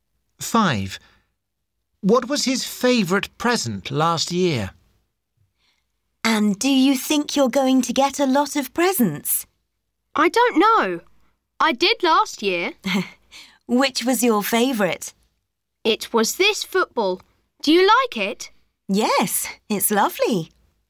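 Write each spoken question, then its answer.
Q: What was his favourite present last year?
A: A football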